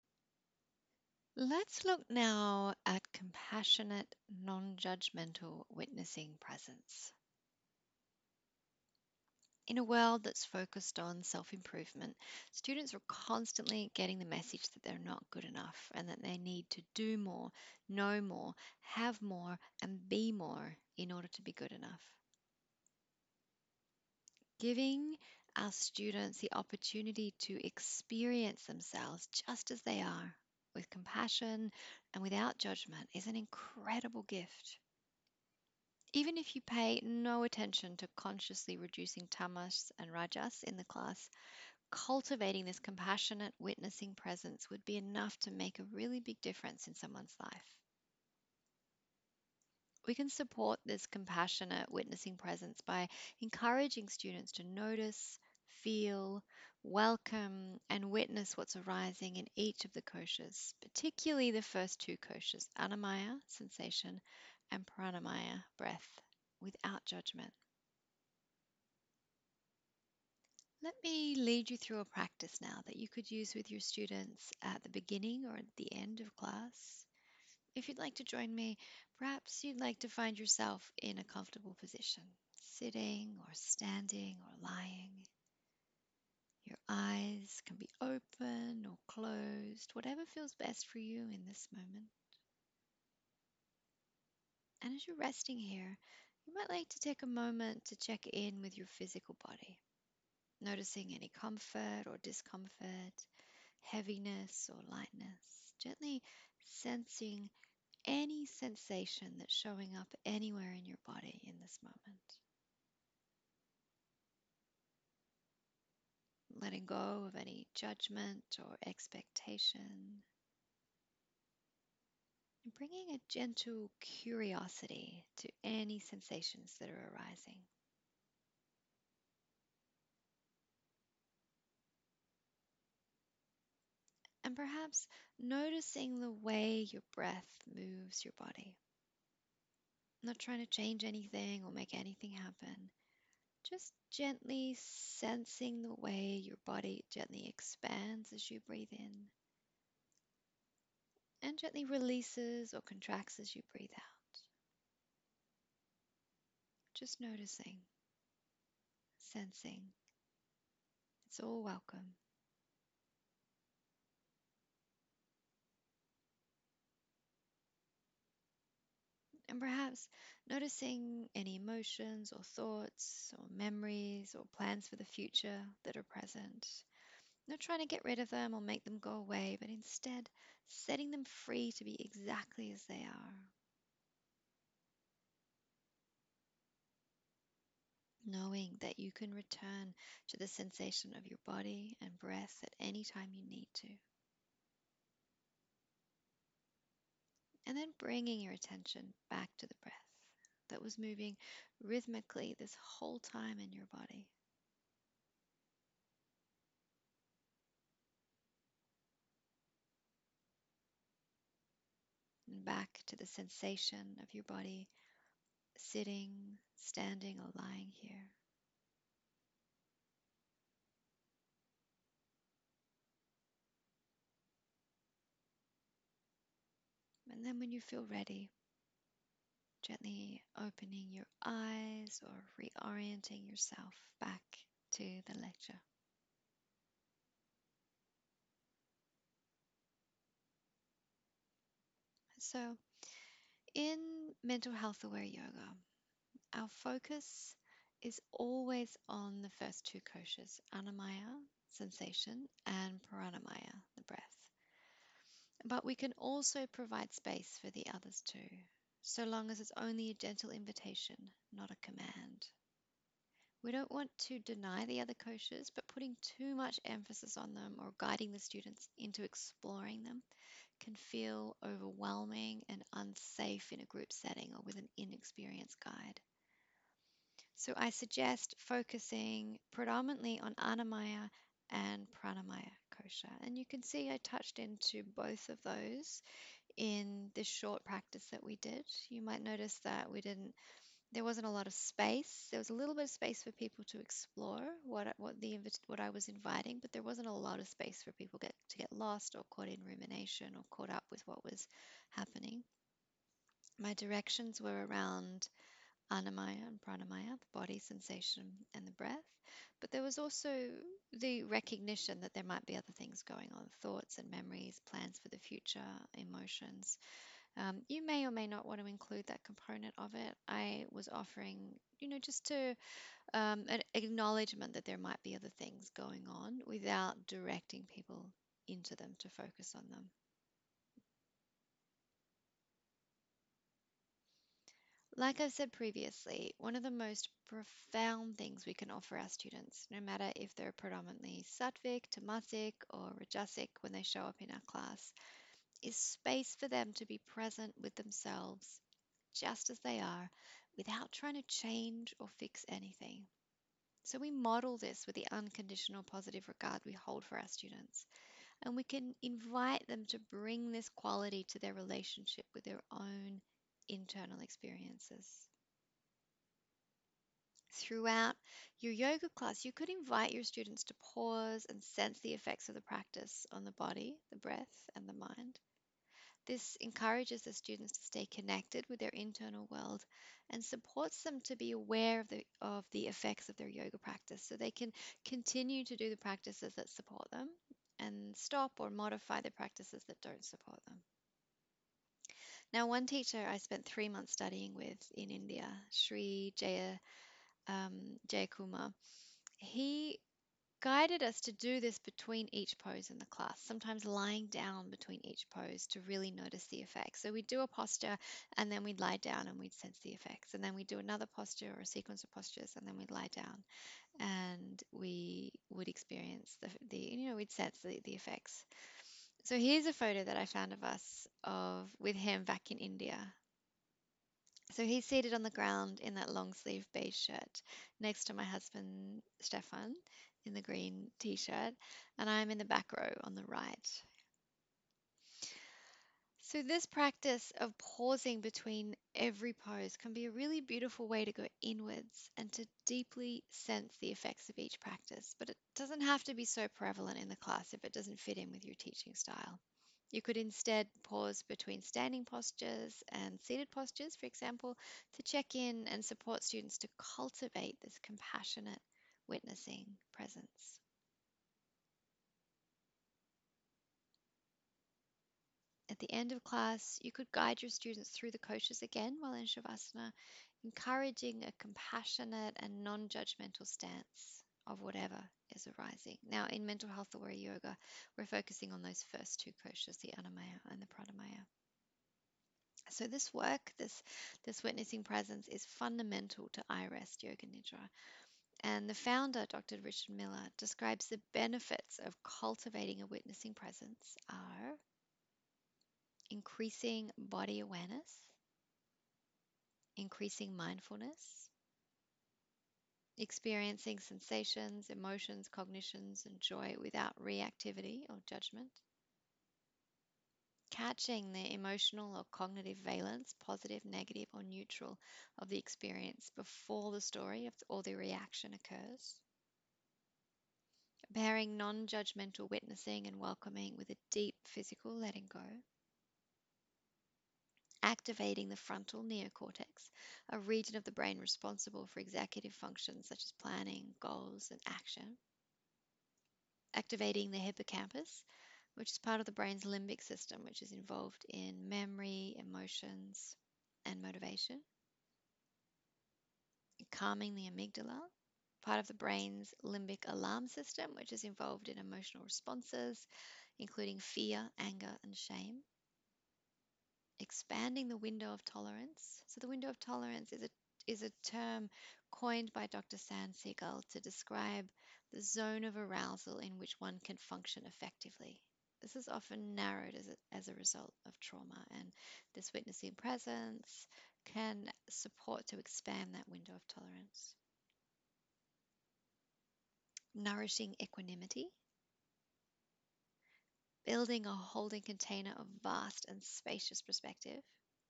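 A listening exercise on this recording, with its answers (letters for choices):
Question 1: What is witnessing presence?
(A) Compassionately and non-judgementally noticing, feeling, welcoming and witnessing what arises.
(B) An advanced prāṇāyama practice.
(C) Witnessing your students' yoga practice.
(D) All of the above.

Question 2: When supporting our students to cultivate a witnessing presence, why is it important to focus on the first two koshas (annamaya and prāṇāmaya) in Mental Health Aware Yoga?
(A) Because the other koshas may feel overwhelming or unsafe for the student in a group setting.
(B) Because the other koshas may feel overwhelming or unsafe with an inexperienced guide.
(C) Because focussing on the first two koshas is likely to feel safer for students.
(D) All of the above.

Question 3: What are some of the benefits of cultivating a witnessing presence?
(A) Increasing body awareness.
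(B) Increasing mindfulness.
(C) Activating the frontal neo-cortex (a region of the brain responsible for the executive functions) and the hippocampus (part of the brain's limbic system, which is involved in memory, emotions and motivation) and calming the amygdala (part of the brain's limbic system alarm, which is involved in emotional responses).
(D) All of the above.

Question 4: What does the term 'window of tolerance' mean?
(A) It's a term used to describe becoming more tolerant of people who you find irritating.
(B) It's a term used by Psychologists to describe the dissociative feeling one experiences whilst daydreaming and gazing out a window.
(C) It's a term used by Dr Dan Siegel to describe the zone of arousal in which one can function effectively, which is often narrowed as a result of trauma.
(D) All of the above.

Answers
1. A
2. D
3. D
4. C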